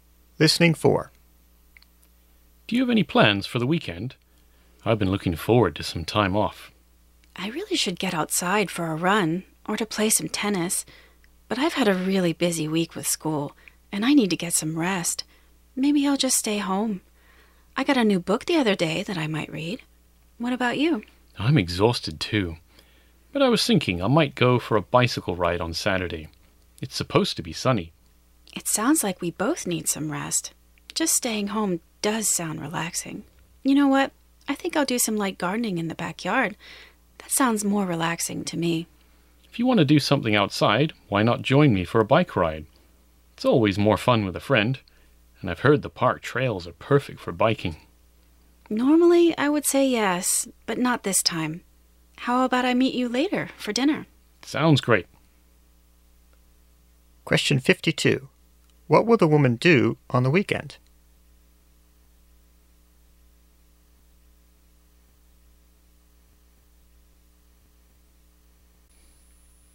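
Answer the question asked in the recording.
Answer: Stay home and do some light gardening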